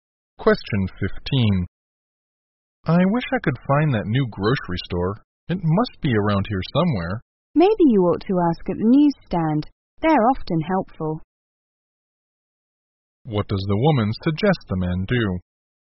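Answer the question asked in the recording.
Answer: Ask for directions at the newsstand.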